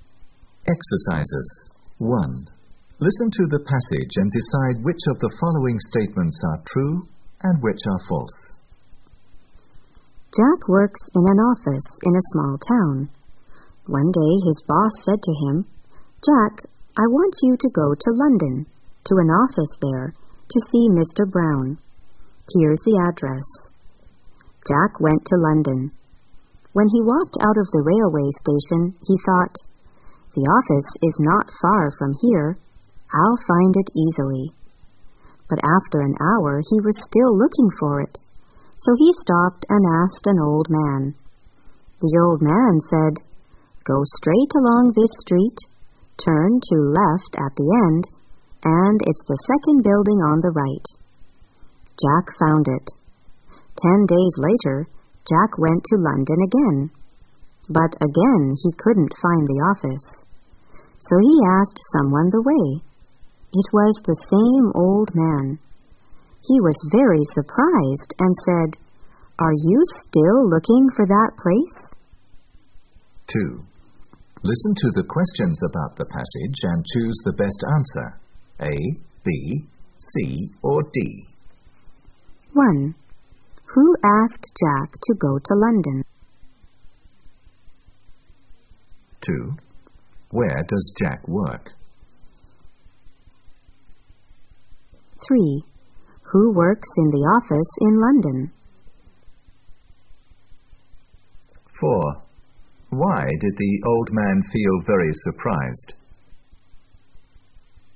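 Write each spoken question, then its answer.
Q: Who asked Jack to go to London?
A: His boss

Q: Where does Jack work?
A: In an office in a small town

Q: Who works in the office in London?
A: Mr. Brown

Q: Why did the old man feel very surprised?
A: He thought Jack was still looking for the office after 10 days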